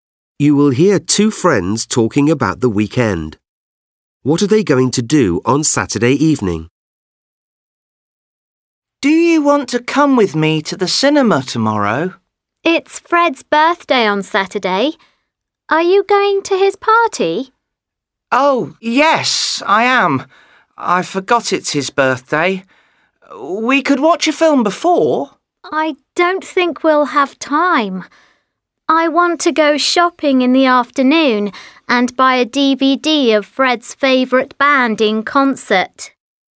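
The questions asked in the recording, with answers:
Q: What are they going to do on Saturday evening?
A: Go to Fred's birthday party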